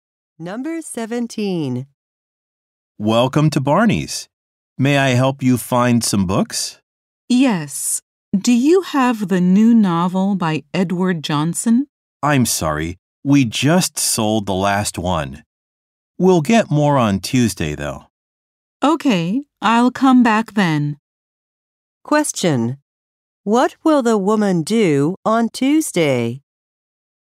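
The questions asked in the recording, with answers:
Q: Question. What will the woman do on Tuesday?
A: Come back to buy the novel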